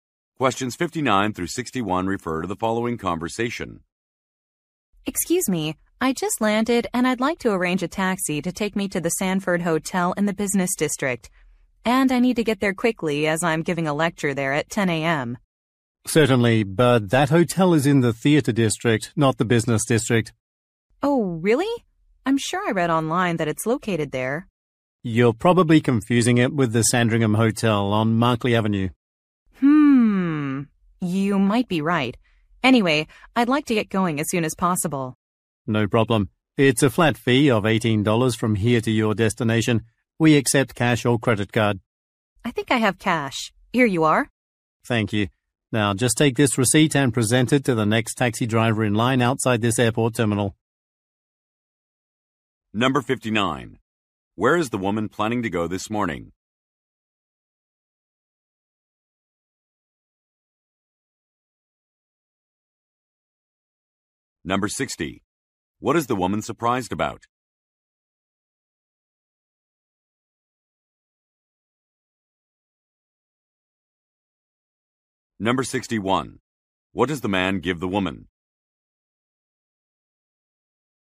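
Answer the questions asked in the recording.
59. The Sanford Hotel
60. The hotel's location
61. A receipt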